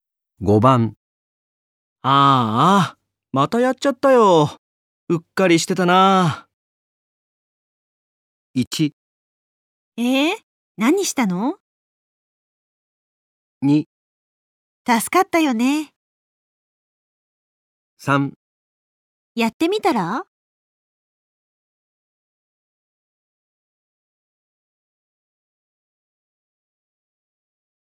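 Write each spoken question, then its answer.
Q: ああ、またやっちゃったよ。うっかりしてたな。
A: 1: 何したの?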